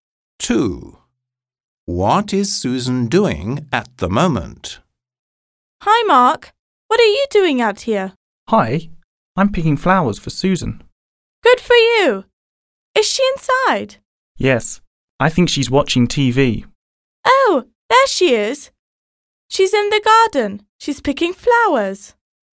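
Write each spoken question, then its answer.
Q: What is Susan doing at the moment?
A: Picking flowers in the garden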